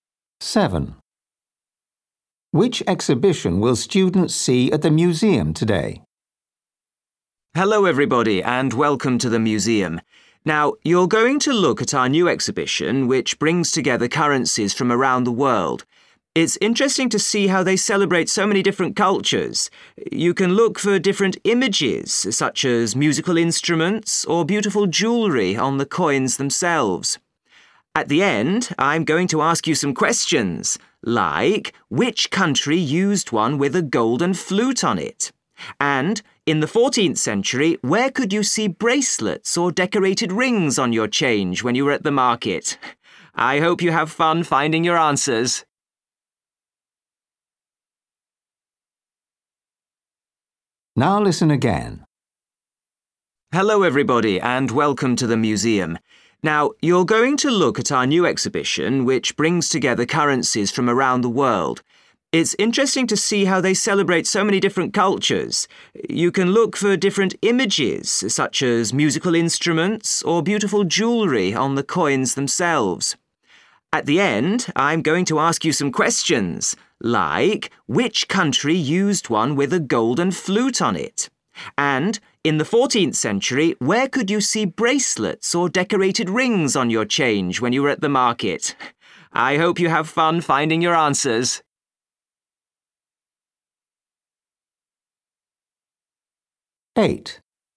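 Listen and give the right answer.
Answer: coins from around the world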